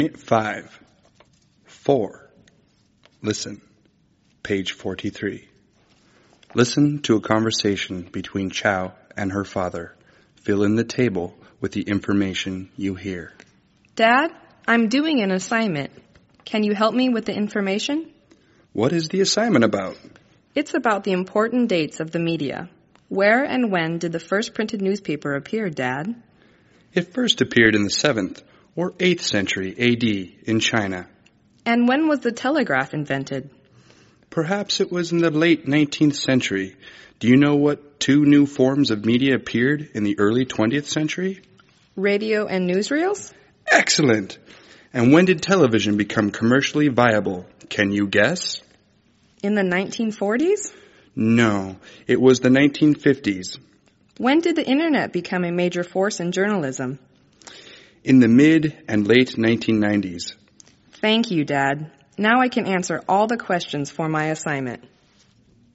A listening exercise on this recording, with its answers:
Listen to a conversation between Chau and her father. Fill in the table with the information you hear.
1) The telegraph was invented.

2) Two new forms of news media appeared:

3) Television become popular.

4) mid- and late 1990s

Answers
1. the late 19th century
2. Radio and newsreel
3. in the 1950s
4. The Internet became a major force in journalism.

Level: Tiếng Anh 9